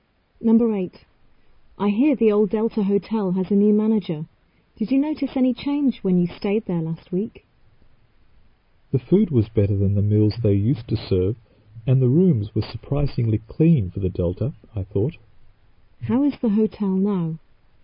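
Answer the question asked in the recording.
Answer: Better: better food and cleaner rooms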